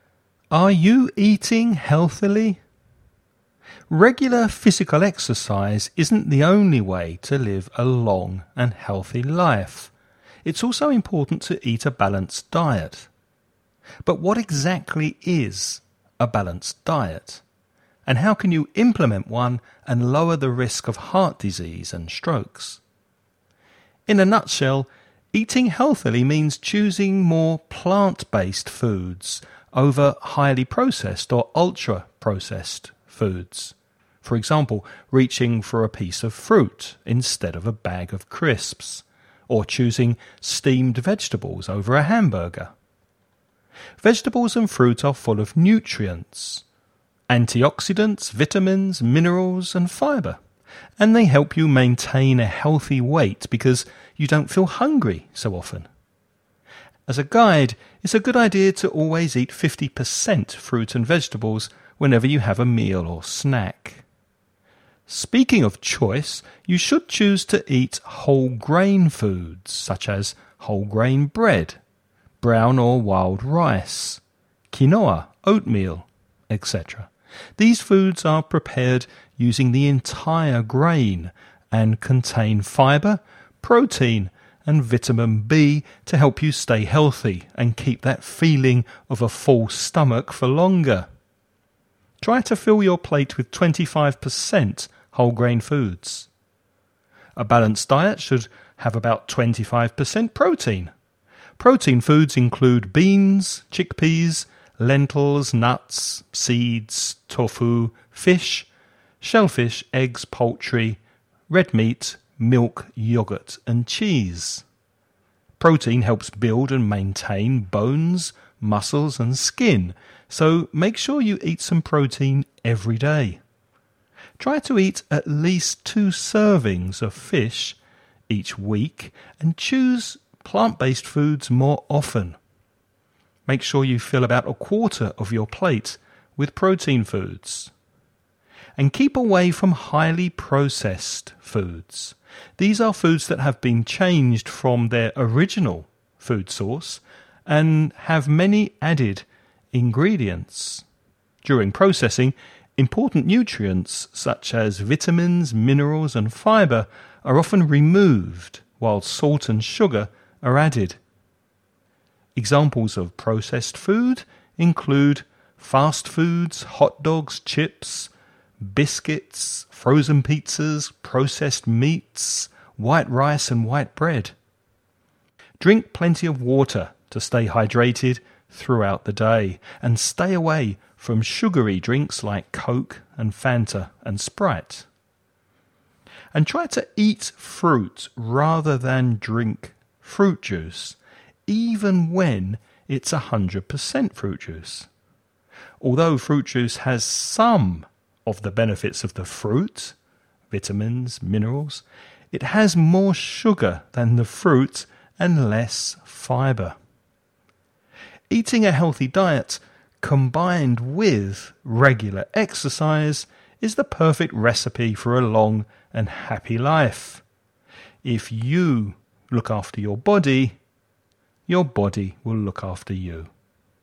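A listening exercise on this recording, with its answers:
Before you listen about a man talking about a healthy diet, read the following questions.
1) Which two food groups contain antioxidants, vitamins, minerals and fibre?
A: Vegetables and fruit

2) What percentage of fruit and vegetables is advised for a healthy meal?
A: 50%

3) What percentage of whole grain foods is advised for a healthy meal?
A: 25%

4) Name at least four types of protein foods of the many that the man suggests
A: beans, chickpeas, lentils, nuts, seeds, tofu, fish, eggs

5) What is often added to highly processed food during processing?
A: salt and sugar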